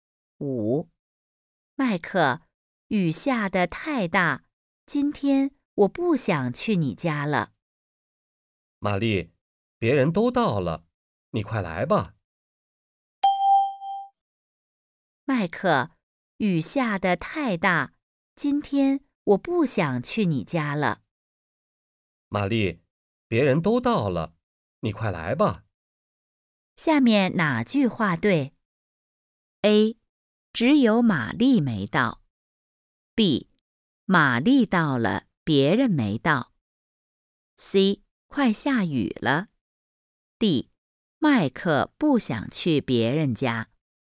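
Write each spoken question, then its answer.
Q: 下面哪句话对?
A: A: 只有玛丽没到。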